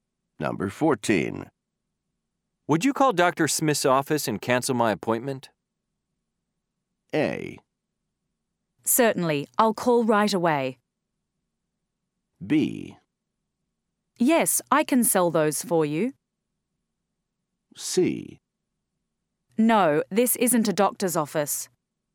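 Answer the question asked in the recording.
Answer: A: Certainly, I'll call right away.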